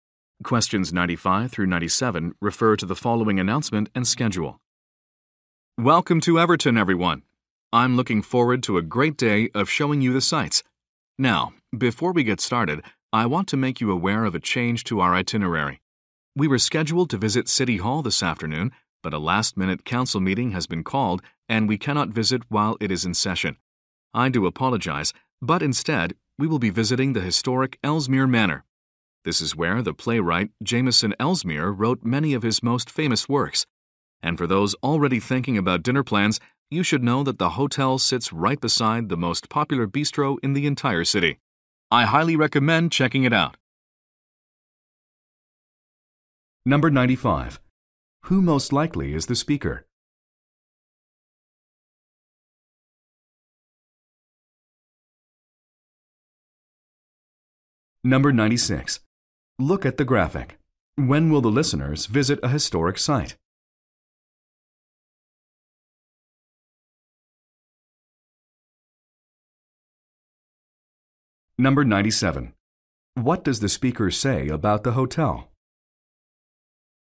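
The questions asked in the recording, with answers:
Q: Who most likely is the speaker?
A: A tour guide

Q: What does the speaker say about the hotel?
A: It is next to the city's most popular bistro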